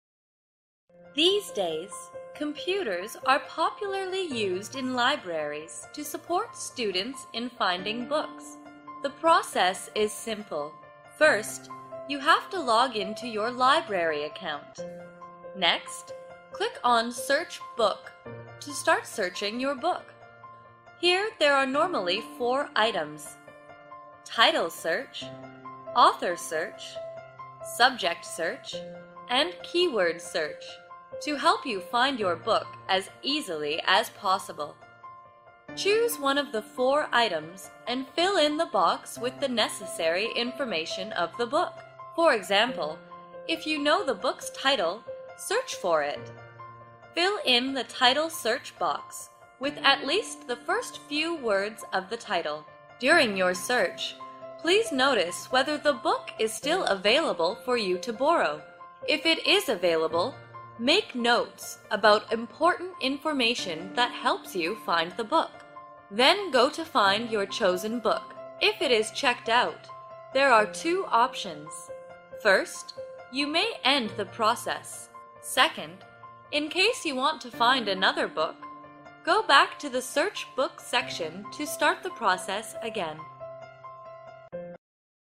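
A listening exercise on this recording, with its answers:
Task: Put the steps in the correct order.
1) Log into your library account.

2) Go find your chosen book.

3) Fill in the search box with the book's information.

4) Choose a search method (title, author, subject, keyword).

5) Check if the book is available.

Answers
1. 1
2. 5
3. 3
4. 2
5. 4

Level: lớp 8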